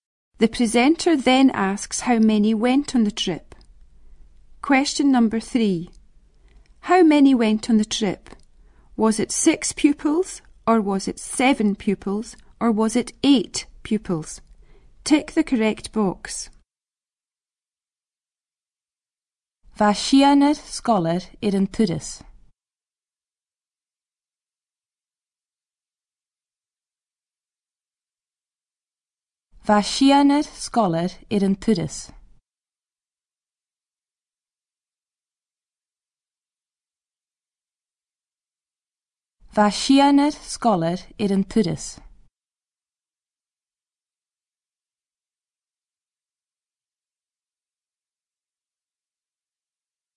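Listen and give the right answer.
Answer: 6 pupils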